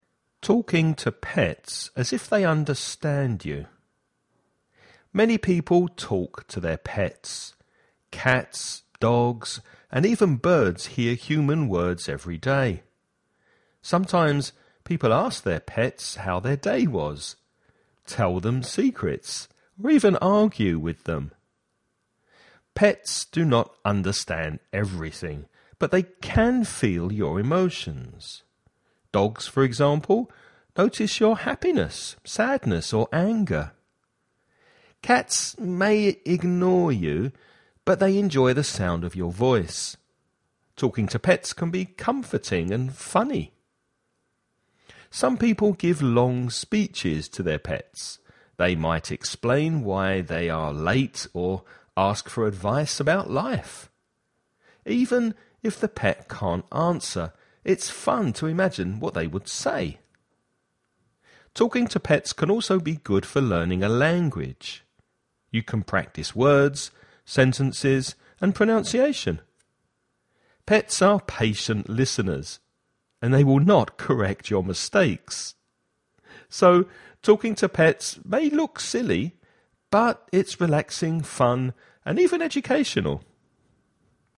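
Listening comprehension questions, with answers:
Now listen and answer the questions.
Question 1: Why do people talk to their pets?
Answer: To ask how their day was, tell them secrets, argue with them; it is comforting and funny.

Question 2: Can pets understand human words completely?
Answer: No, they do not understand everything.

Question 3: How do pets react to emotions?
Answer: They can feel your emotions; dogs notice happiness, sadness or anger.

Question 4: How can talking to pets help with language learning?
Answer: You can practise words, sentences and pronunciation; pets are patient and don't correct mistakes.

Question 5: What is the main idea of this text?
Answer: Talking to pets may look silly, but it is relaxing, fun and even educational.

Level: INTERMEDIO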